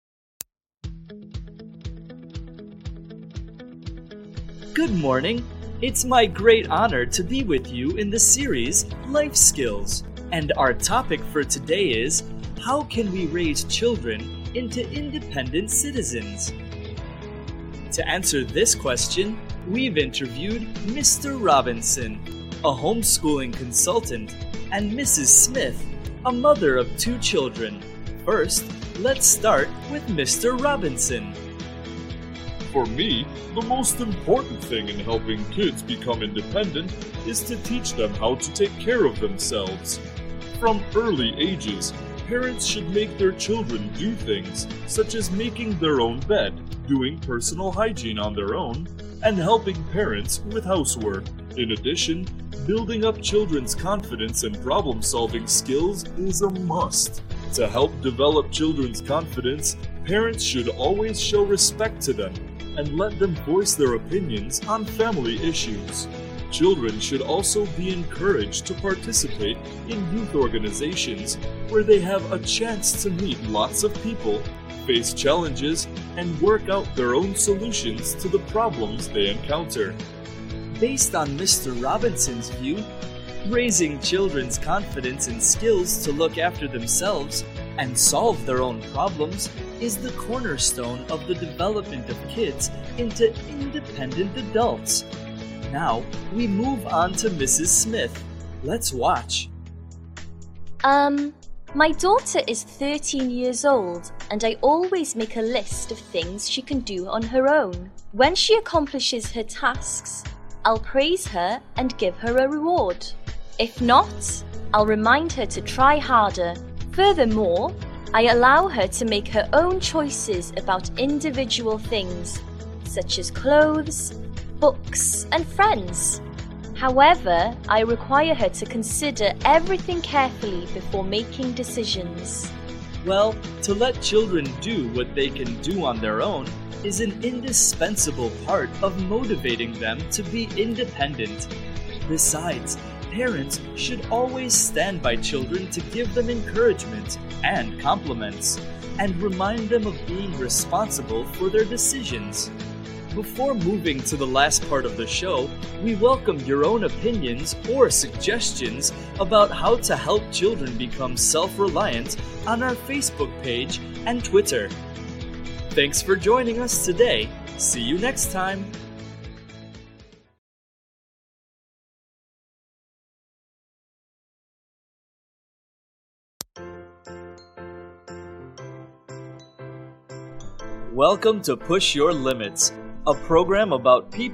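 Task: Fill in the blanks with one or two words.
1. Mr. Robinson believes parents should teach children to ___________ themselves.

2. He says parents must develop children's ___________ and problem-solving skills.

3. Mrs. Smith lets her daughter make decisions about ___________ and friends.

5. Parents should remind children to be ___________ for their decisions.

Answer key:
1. take care of
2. confidence
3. clothes, books
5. responsible

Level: lớp 11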